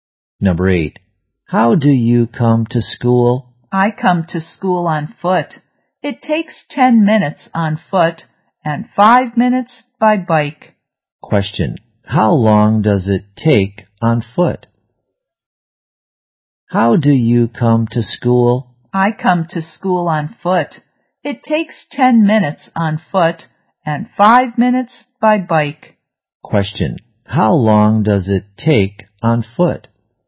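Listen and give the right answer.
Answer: 10 minutes.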